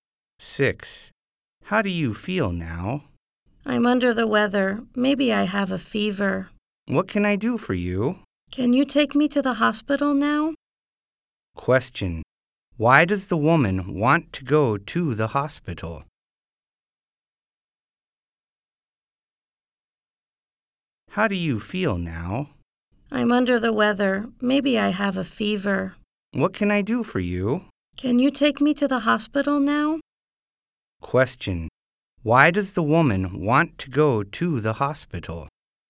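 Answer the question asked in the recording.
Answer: She feels sick; maybe she has a fever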